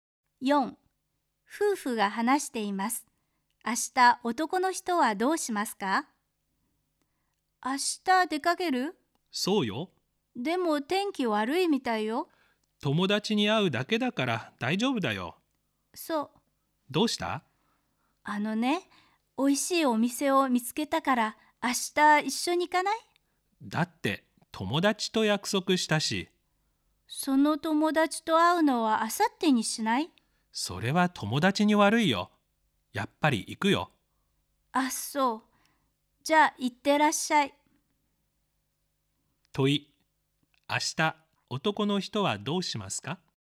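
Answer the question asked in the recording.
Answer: 出かけて友達に会う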